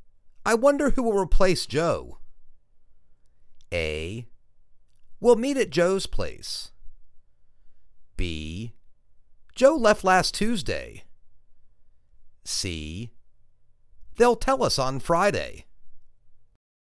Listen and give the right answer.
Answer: They'll tell us on Friday.